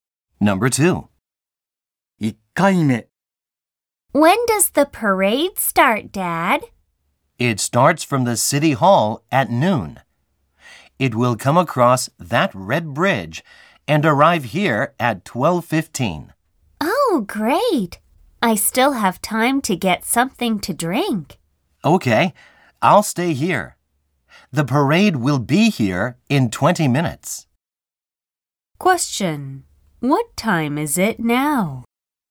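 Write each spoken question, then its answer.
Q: What time is it now?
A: 11:55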